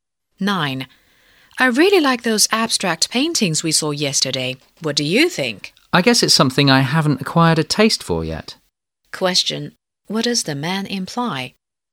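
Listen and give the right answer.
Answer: He doesn't like the abstract paintings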